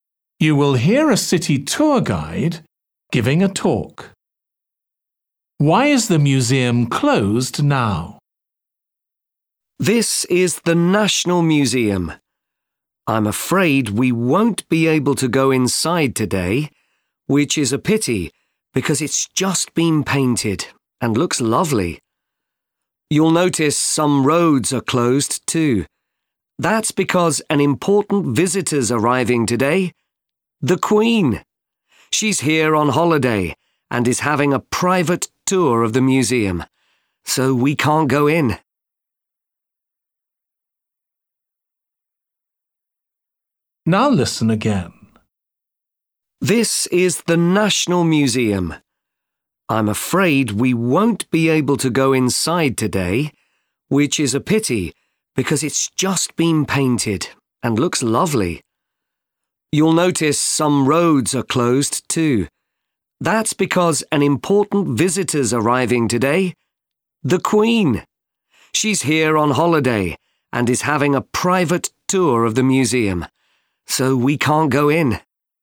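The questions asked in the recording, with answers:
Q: Why is the museum closed now?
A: the Queen is having a private tour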